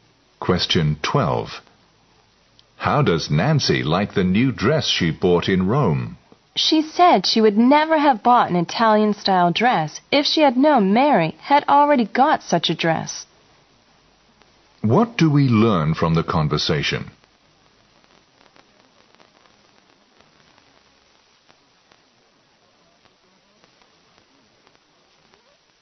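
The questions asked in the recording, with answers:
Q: What do we learn from the conversation?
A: Nancy regrets buying the Italian-style dress because Mary already has one like it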